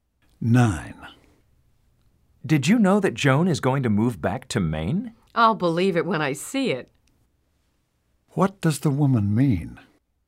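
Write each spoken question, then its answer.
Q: What does the woman mean?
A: She doubts Joan will really move.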